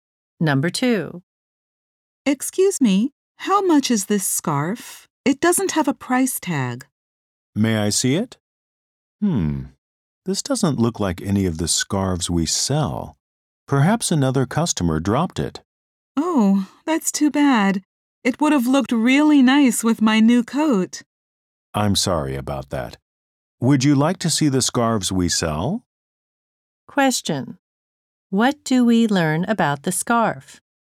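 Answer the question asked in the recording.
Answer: It isn't sold at the store; another customer probably dropped it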